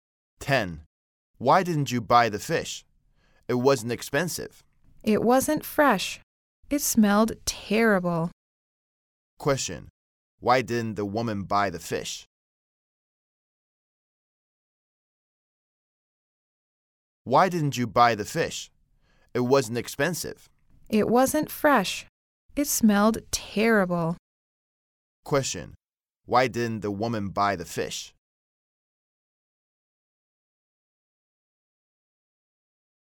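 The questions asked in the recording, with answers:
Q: Why didn't the woman buy the fish?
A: It wasn't fresh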